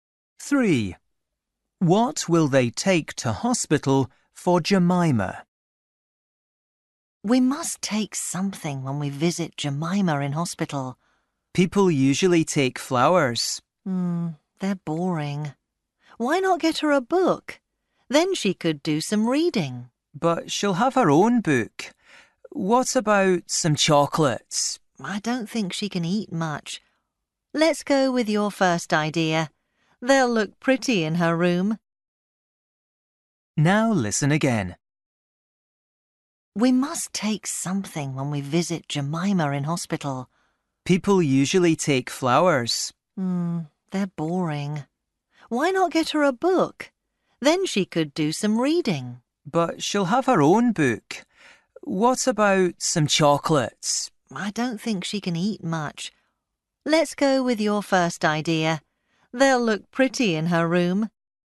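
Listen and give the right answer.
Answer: flowers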